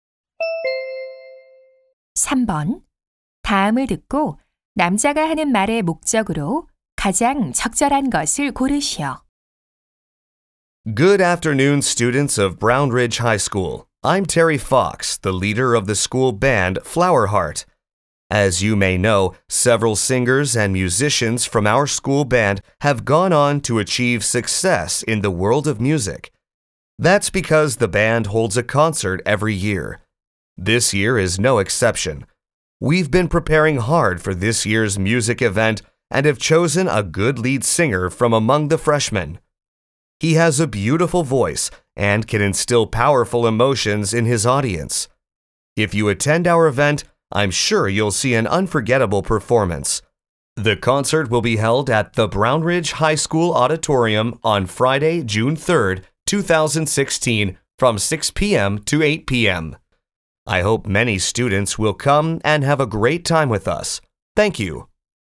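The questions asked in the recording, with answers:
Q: 다음을 듣고 남자가 하는 말의 목적으로 가장 적절한 것을 고르시오.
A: 학교 밴드 콘서트를 홍보하고 참석을 권하려고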